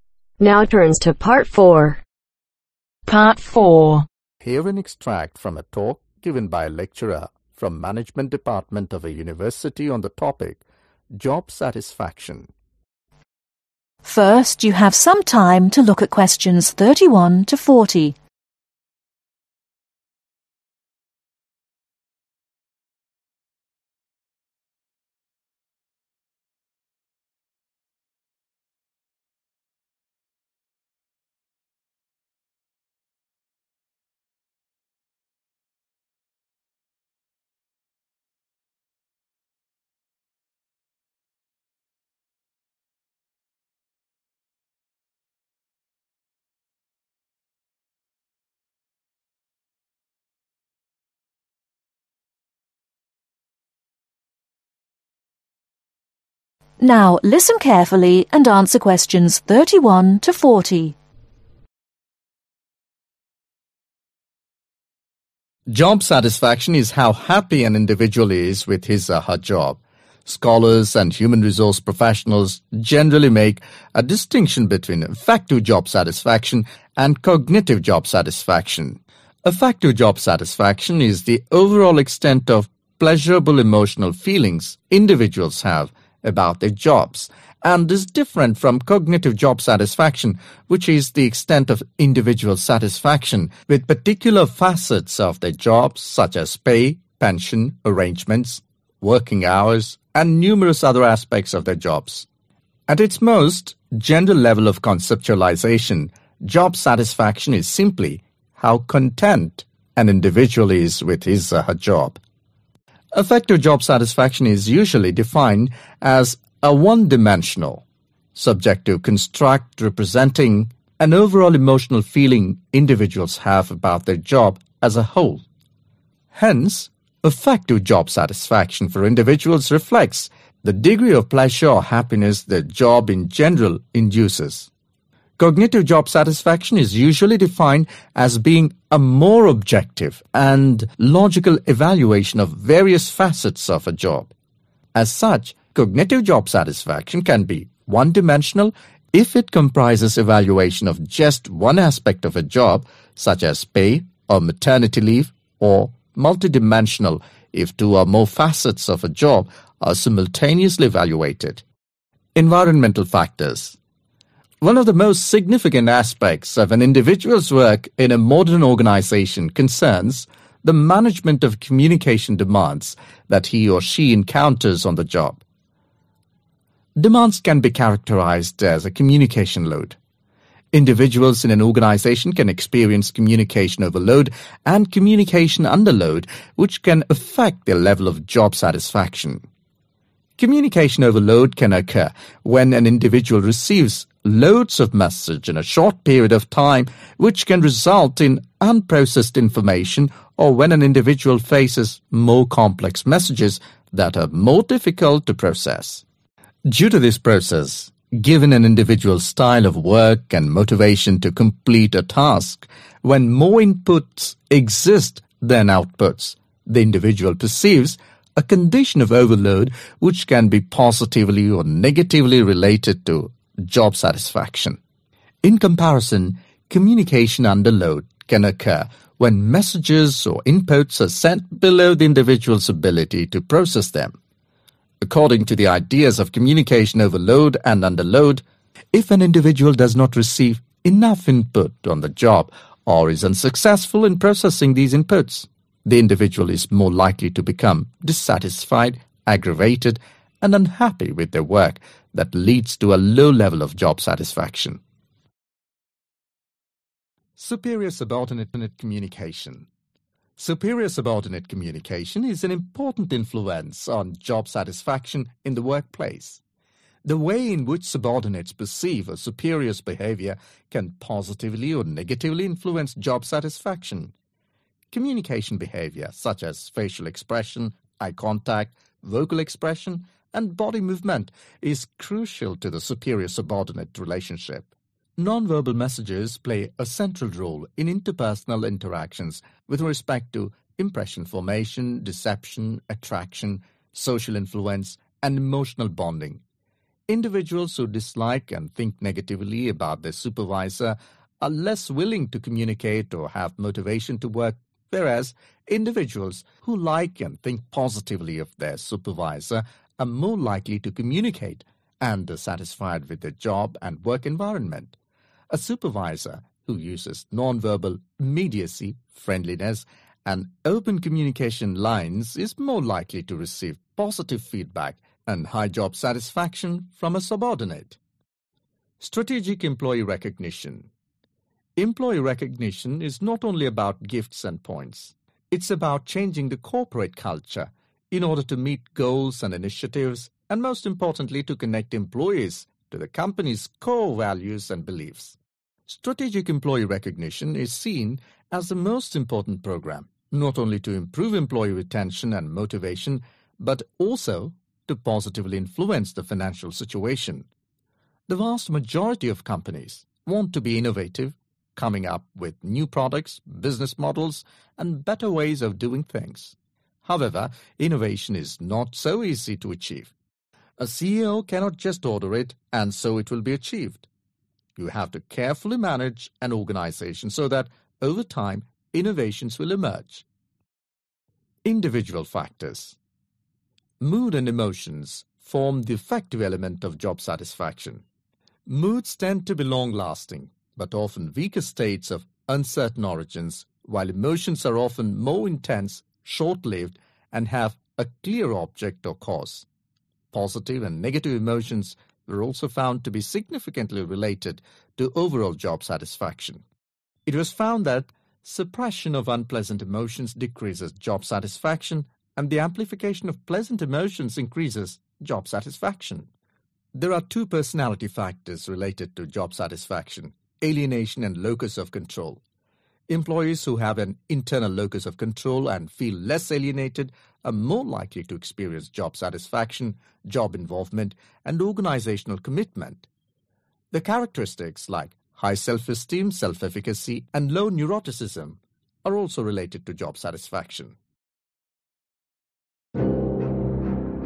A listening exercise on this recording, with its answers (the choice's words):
Choose the correct letter A-C.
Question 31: Educated people differentiate between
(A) Affective and cognitive job satisfaction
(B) Mental and emotional job satisfaction means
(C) intellectual and physical job satisfaction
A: Affective and cognitive job satisfaction

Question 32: General job satisfaction means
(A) Depressed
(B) Unhappy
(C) Content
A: Content

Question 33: Affective job satisfaction for a particular person means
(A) Leadership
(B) Comfort and Pleasure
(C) Achievements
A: Comfort and Pleasure

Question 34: What can be one dimensional if it comprises evaluation of only one aspect of job.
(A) affective job satisfaction.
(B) cognitive job satisfaction.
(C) Emotional job satisfaction.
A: cognitive job satisfaction.

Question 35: Demand is characterized as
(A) Communication Load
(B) Non imparting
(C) No Message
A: Communication Load

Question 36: Individual unhappiness caused due to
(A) communication with no ideas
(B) Communication with on out put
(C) Not having enough input on job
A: Not having enough input on job

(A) Yes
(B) No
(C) May Be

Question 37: Communication between a superior and a subordinate has vital effect on job satisfaction ........ .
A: Yes

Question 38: Gestural message play a non vital role ............ .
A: No

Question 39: Strategic employee recognition gives a positive impact to the financial situation ........... .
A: Yes